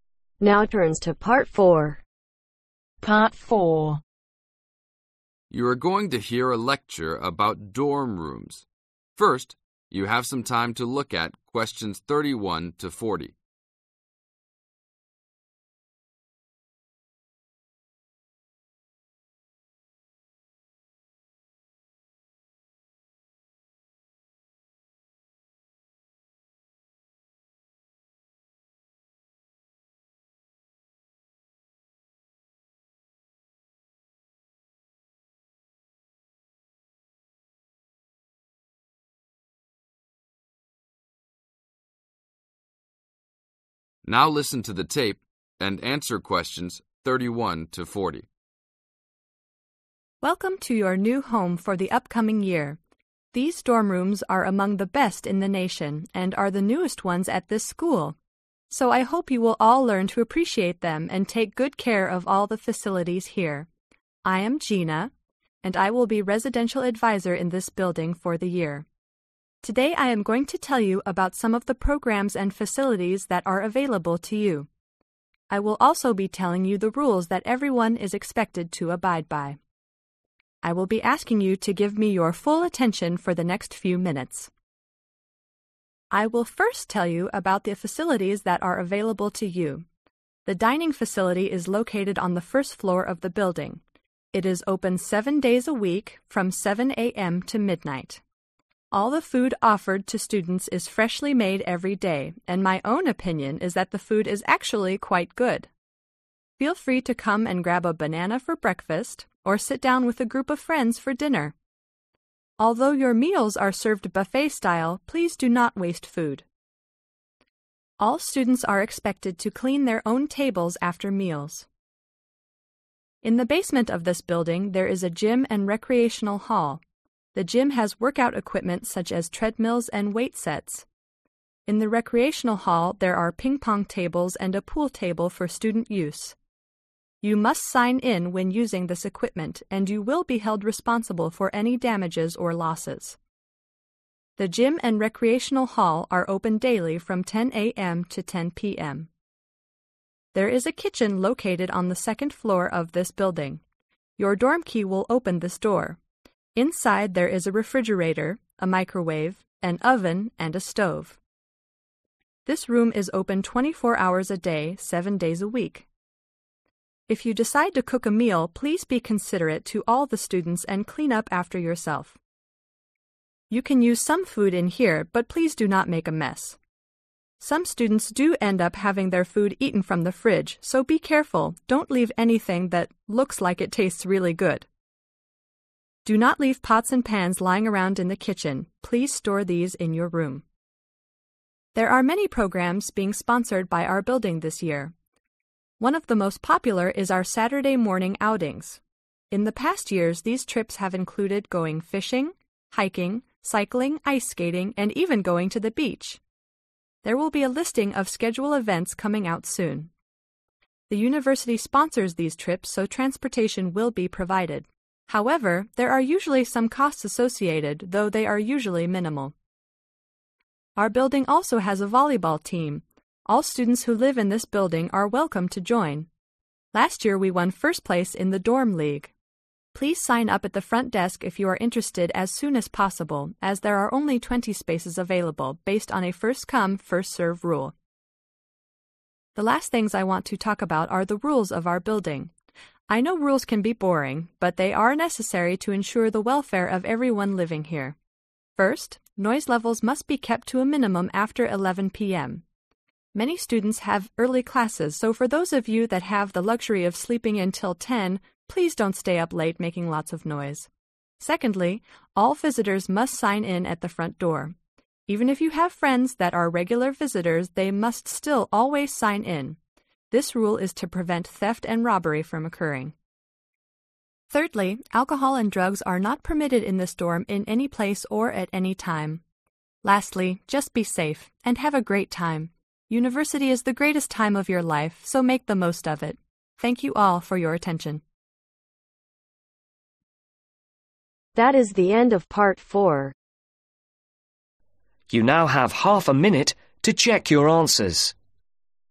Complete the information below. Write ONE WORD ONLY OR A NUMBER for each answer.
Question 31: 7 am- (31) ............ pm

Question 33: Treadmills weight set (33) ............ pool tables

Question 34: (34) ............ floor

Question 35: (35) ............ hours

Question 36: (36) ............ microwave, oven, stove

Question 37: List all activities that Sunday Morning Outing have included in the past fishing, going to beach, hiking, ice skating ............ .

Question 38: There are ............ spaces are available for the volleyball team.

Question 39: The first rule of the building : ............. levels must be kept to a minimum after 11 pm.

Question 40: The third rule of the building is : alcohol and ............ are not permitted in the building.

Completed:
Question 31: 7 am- 12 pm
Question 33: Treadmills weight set ping-pong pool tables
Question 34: 2nd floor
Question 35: 24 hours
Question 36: Refrigerator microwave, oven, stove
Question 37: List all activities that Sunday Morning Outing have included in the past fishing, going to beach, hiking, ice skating cycling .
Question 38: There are 20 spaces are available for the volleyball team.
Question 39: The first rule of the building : noise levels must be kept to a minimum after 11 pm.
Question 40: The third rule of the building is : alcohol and drugs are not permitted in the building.